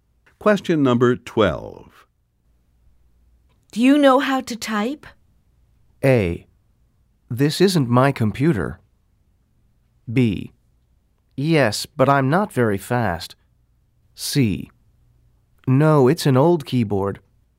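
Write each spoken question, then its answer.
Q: Do you know how to type?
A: B: Yes, but I'm not very fast.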